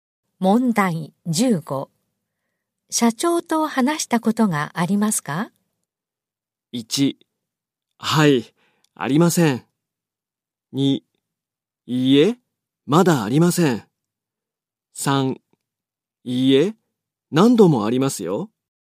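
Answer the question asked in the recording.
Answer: 2: いいえ、まだありません。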